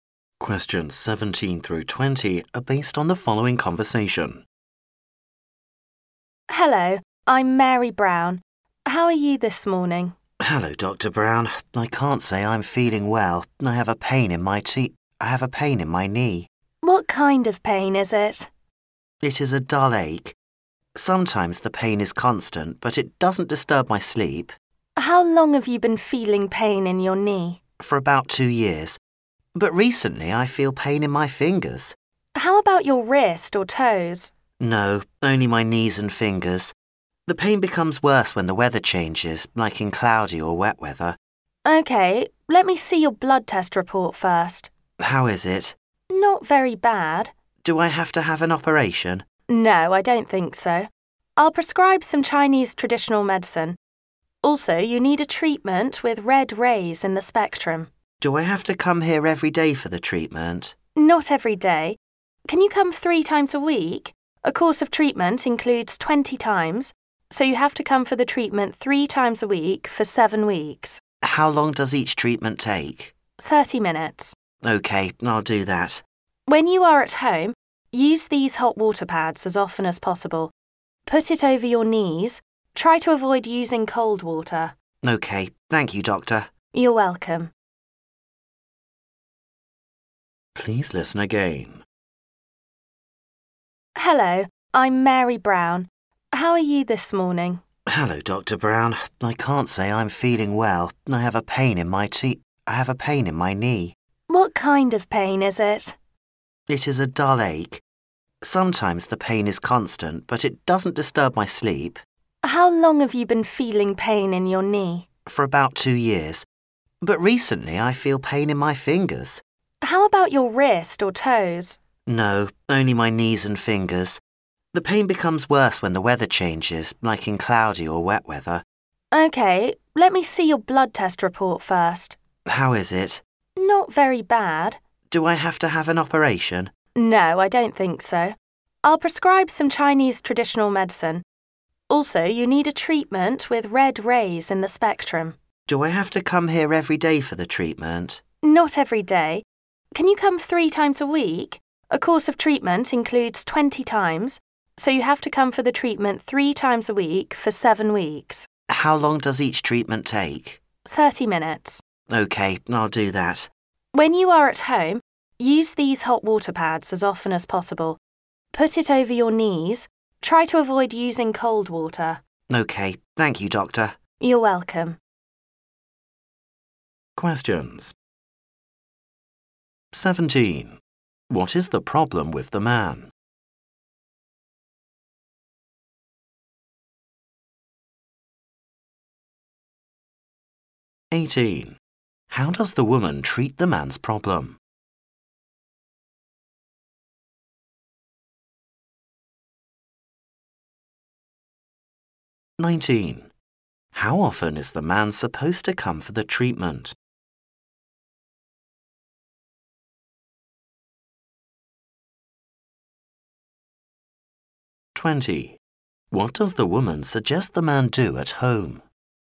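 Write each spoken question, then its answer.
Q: What is the problem with the man?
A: Pain in his knees and fingers

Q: How does the woman treat the man's problem?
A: Chinese traditional medicine and red-ray treatment

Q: How often is the man supposed to come for the treatment?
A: 3 times a week

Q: What does the woman suggest the man do at home?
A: Use hot water pads on his knees and avoid cold water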